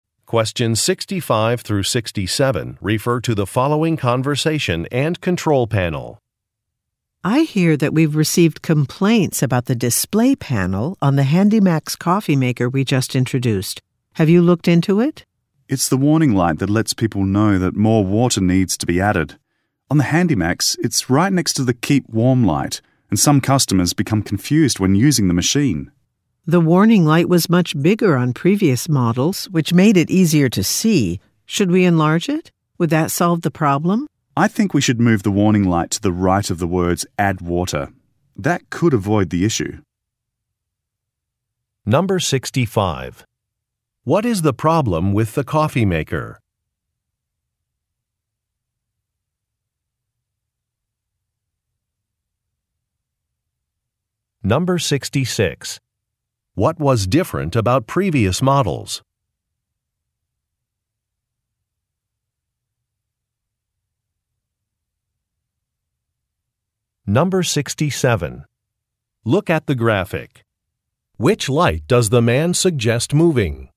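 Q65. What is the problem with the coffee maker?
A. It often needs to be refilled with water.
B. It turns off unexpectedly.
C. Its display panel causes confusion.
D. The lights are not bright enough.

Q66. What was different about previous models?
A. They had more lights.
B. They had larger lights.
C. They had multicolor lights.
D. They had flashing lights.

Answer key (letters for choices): 65C, 66B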